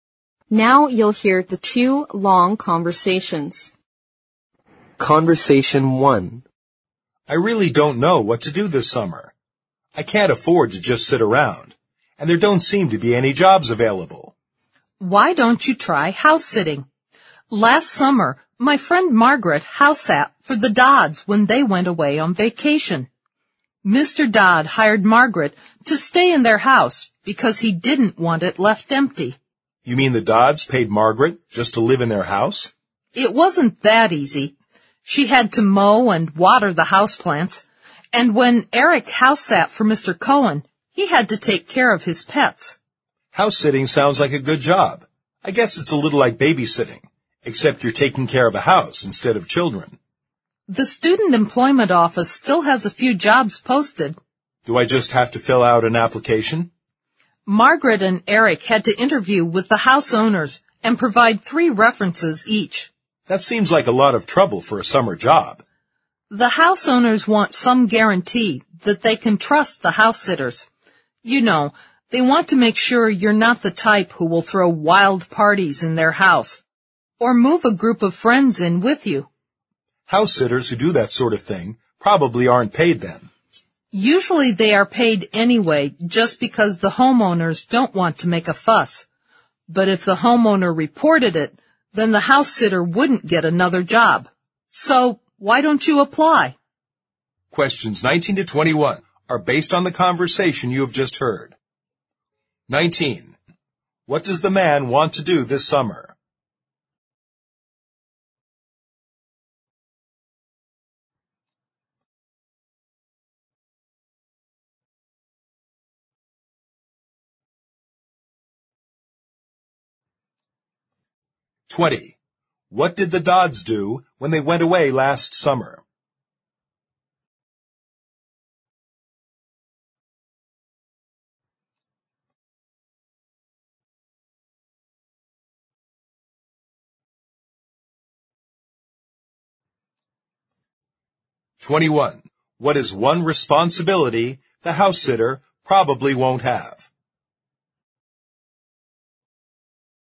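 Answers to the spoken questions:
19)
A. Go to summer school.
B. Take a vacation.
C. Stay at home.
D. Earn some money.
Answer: D. Earn some money.
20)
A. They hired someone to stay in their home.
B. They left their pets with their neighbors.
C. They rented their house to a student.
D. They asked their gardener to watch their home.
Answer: A. They hired someone to stay in their home.
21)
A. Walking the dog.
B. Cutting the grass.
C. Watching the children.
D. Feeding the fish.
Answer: C. Watching the children.

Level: 四级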